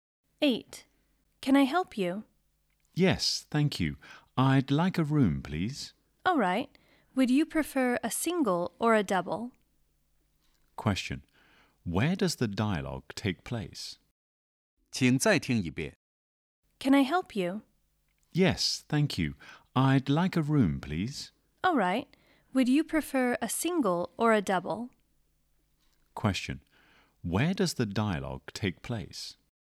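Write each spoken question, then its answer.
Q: Where does the dialogue take place?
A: In a hotel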